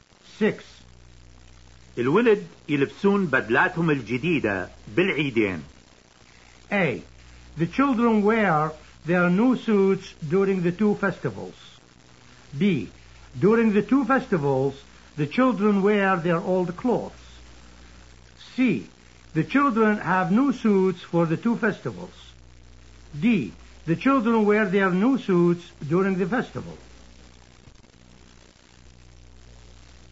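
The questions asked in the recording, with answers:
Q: الولد يلبسون بدلاتهم الجديدة بالعيدين.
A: A: The children wear their new suits during the two festivals.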